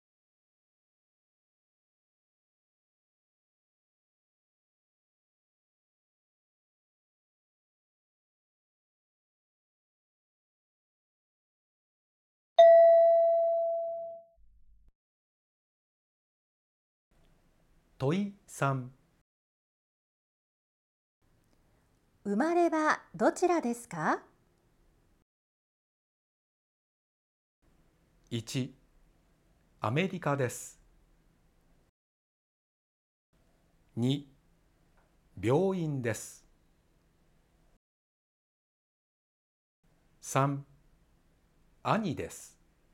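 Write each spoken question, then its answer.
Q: 生まれはどちらですか?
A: 1: アメリカです。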